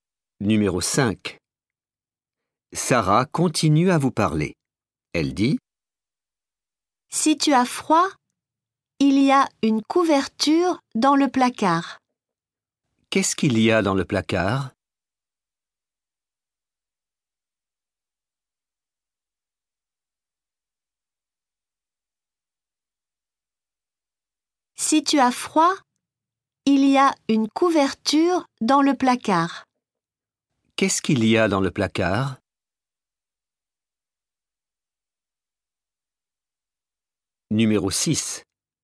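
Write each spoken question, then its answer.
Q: Qu'est-ce qu'il y a dans le placard?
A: Une couverture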